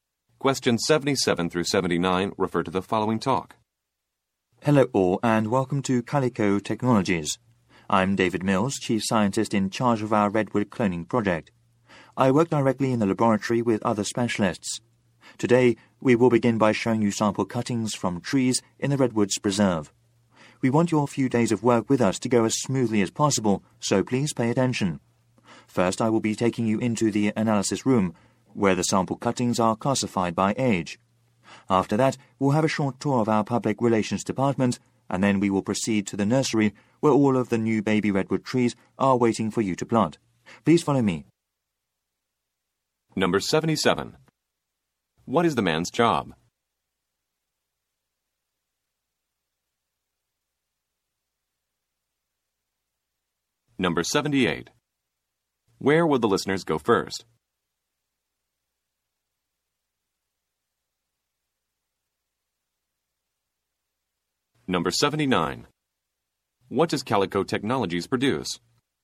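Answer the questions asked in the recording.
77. Chief scientist
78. The analysis room
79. Cloned redwood trees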